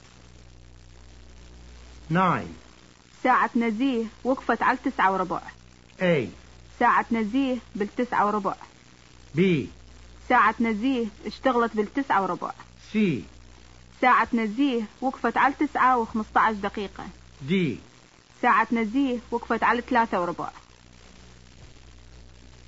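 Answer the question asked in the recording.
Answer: C: ساعة نزيه وقفت على 9:15 دقيقة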